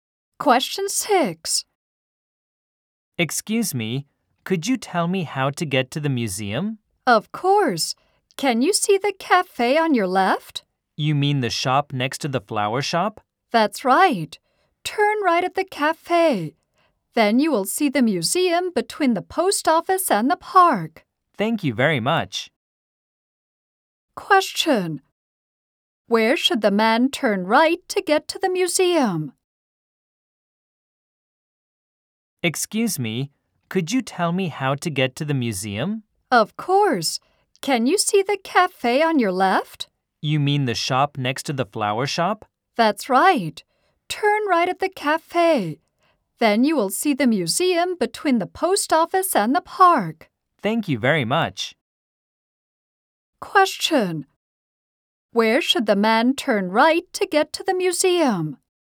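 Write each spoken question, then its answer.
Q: Where should the man turn right to get to the museum?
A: At the cafe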